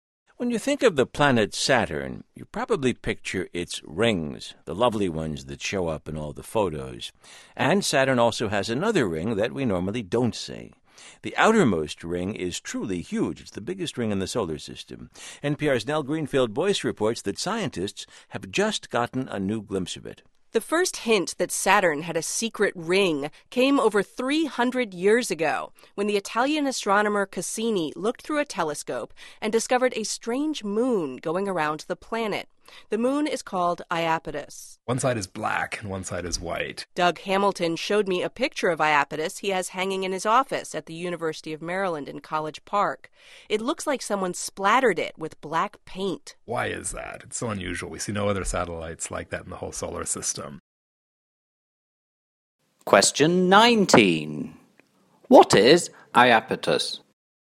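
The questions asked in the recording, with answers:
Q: What is Iapetus?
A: A moon of Saturn, black on one side and white on the other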